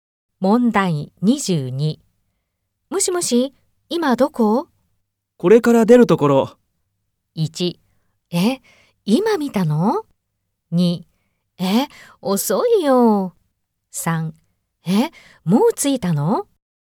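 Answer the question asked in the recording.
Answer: 2: え、遅いよ。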